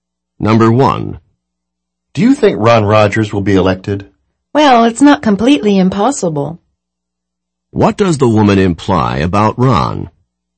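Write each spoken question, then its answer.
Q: What does the woman imply about Ron?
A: It's possible that Ron will be elected.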